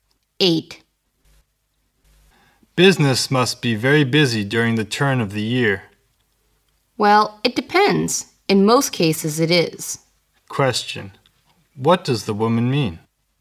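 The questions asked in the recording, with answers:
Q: What does the woman mean?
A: Business is usually, but not always, busy then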